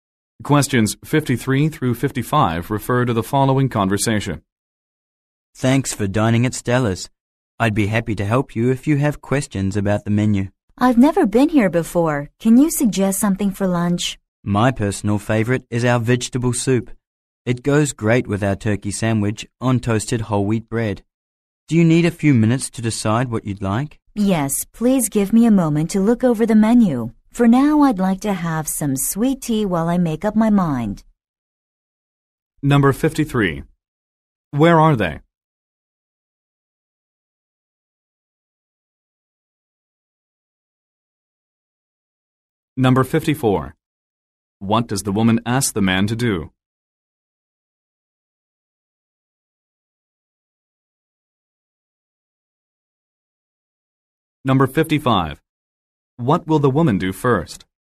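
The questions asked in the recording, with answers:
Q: Where are they?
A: At a restaurant

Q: What will the woman do first?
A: Have some sweet tea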